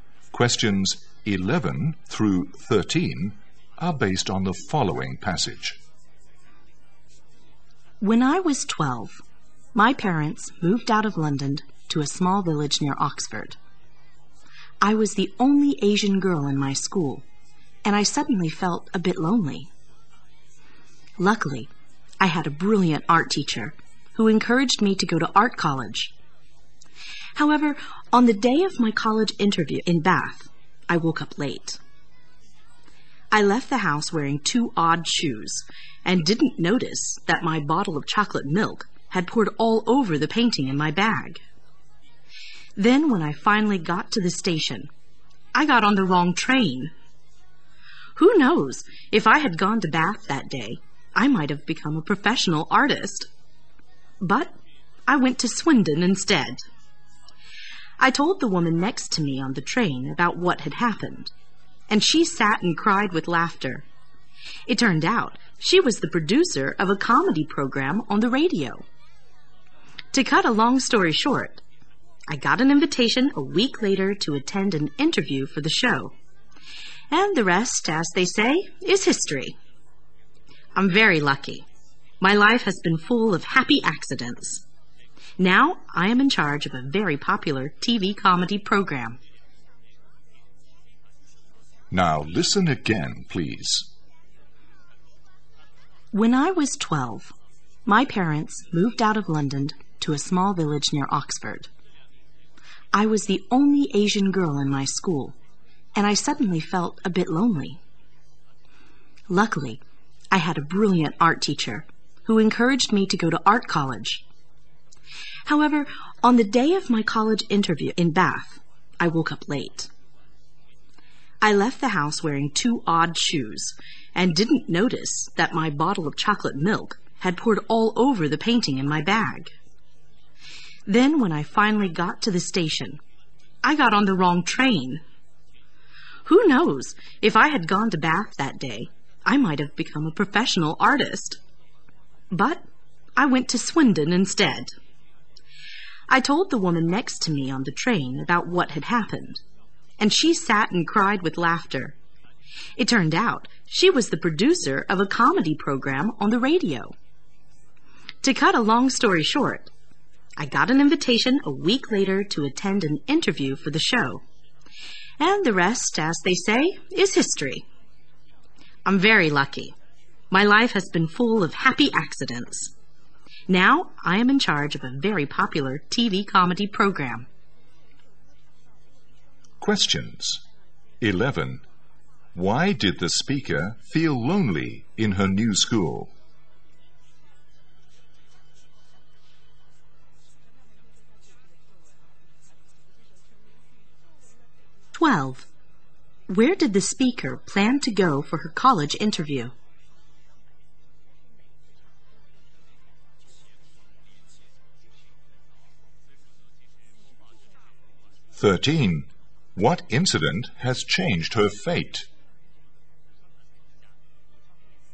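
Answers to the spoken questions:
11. She was the only Asian girl in the school
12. Bath
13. Getting on the wrong train and meeting a radio comedy producer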